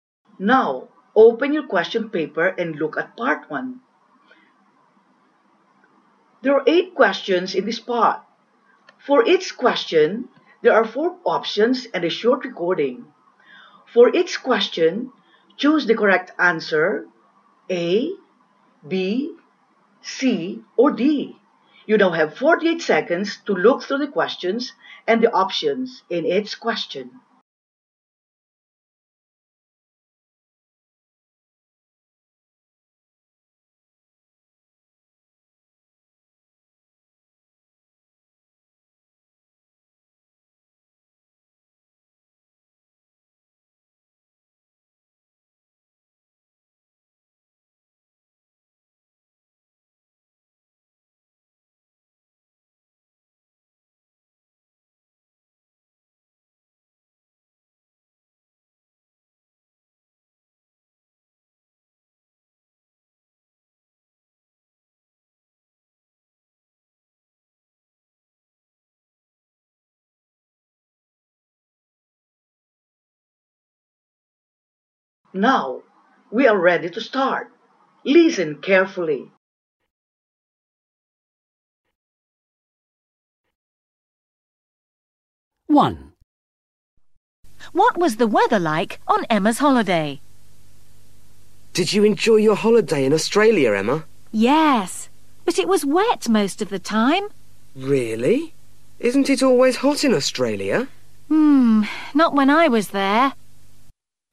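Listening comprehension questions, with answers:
What was the weather like on Emma's holiday?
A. It's hot.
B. It's sunny.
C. It's wet.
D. It's windy.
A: C. It's wet.

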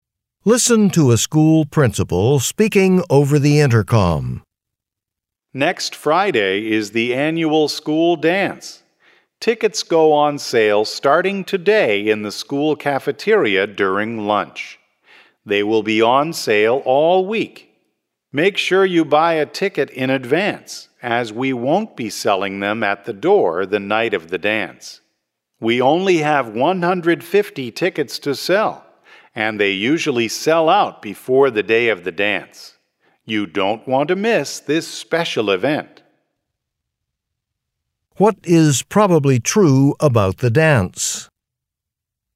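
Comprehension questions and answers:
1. What is probably true about the dance?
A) It is a very popular event.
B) It is not usually held on a Friday.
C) It will take place in the cafeteria.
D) It is the first dance of the school year.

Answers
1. A) It is a very popular event.

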